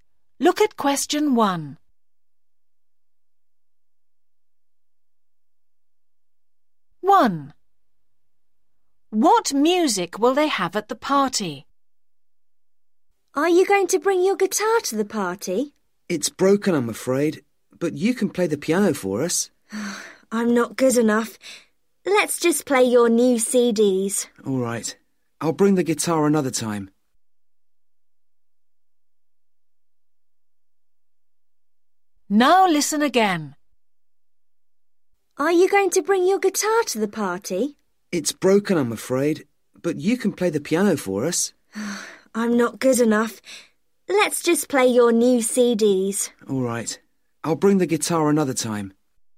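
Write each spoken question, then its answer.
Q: What music will they have at the party?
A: new CDs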